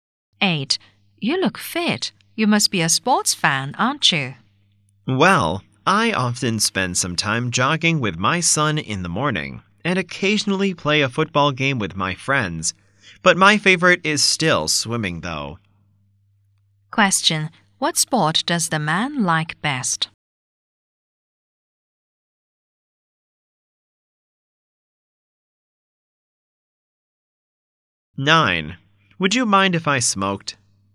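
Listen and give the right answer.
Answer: Swimming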